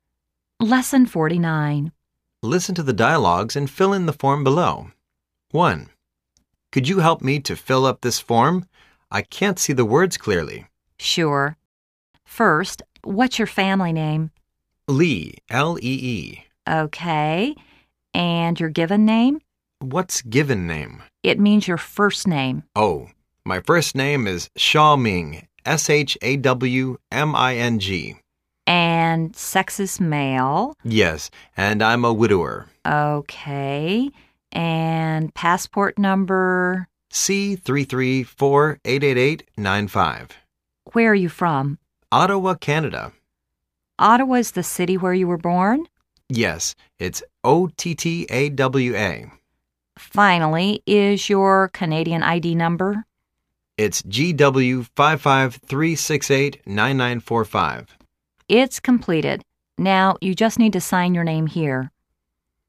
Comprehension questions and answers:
Listen to the dialogues and fill in the form below.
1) Name:______ _______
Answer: Lee SHAW MING

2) Passport No:_______________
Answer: C33488895

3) Country of Birth:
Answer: Canada

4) City of Birth:_________________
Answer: Ottawa